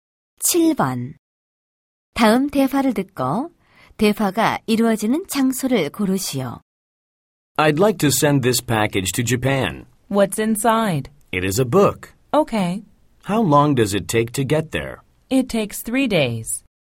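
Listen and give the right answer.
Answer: 우체국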